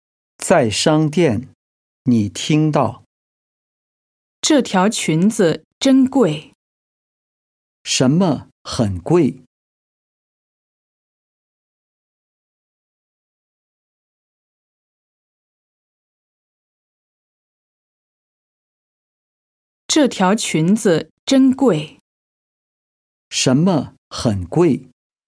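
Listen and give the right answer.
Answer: 裙子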